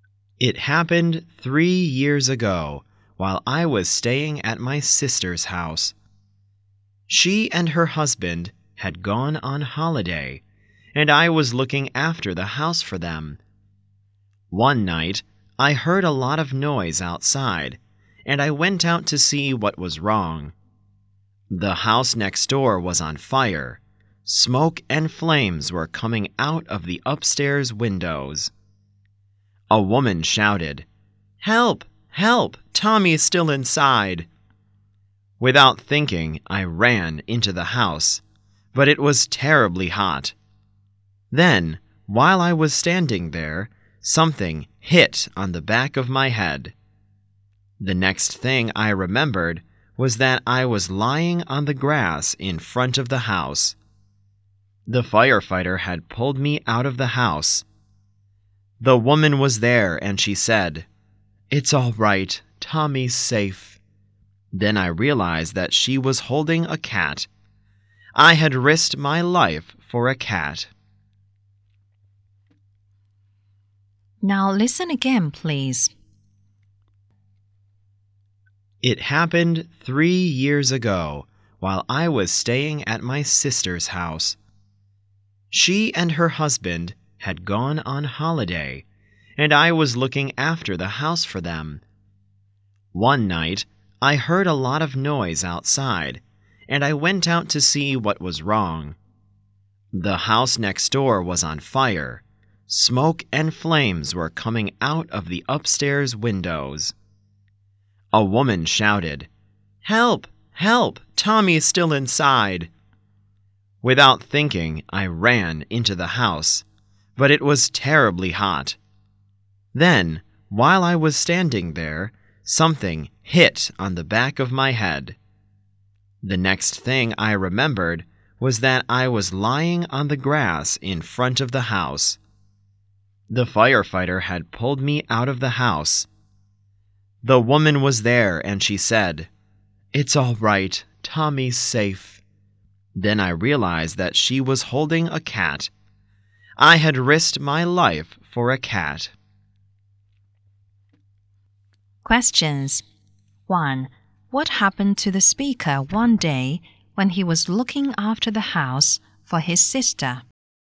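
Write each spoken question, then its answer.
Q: What happened to the speaker one day when he was looking after the house for his sister?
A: The house next door caught fire; he ran in to save Tommy, was hit on the head, and was pulled out by a firefighter — Tommy turned out to be a cat.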